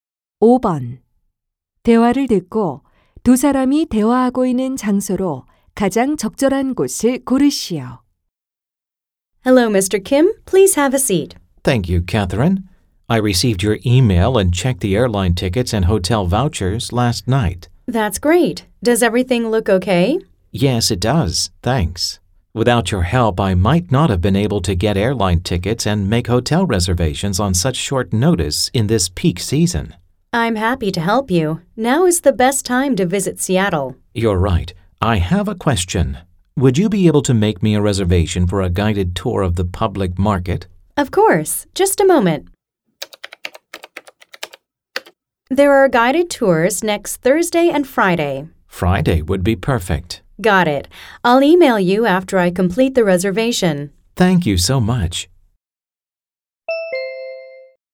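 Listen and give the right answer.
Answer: 여행사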